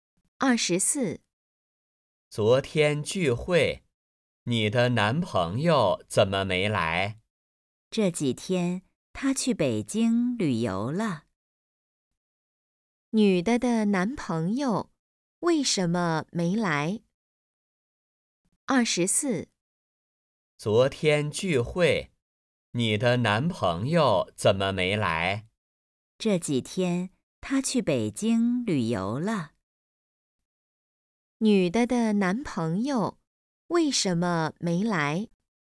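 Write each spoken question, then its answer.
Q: 女的的男朋友为什么没来?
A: 他去北京旅游了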